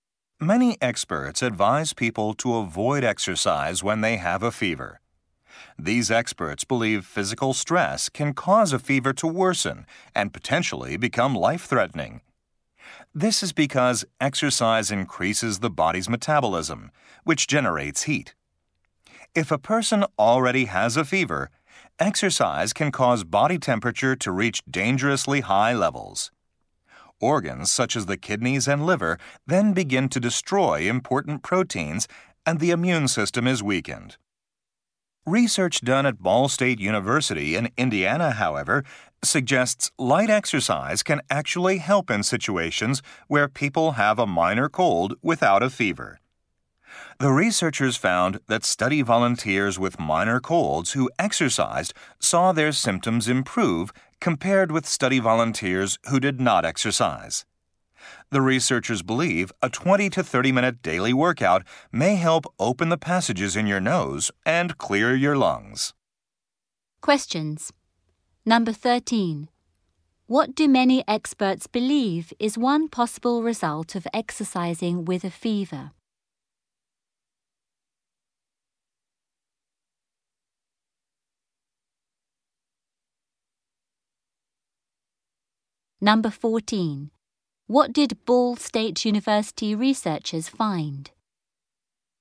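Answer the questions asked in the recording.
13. Body temperature can get dangerously high, and the immune system can be weakened.
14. Light exercise improved the symptoms of minor colds without a fever.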